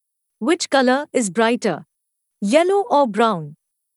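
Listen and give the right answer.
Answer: yellow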